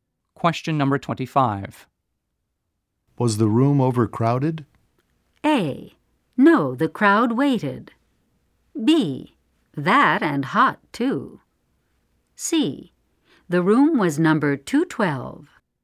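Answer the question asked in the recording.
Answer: B: That and hot, too.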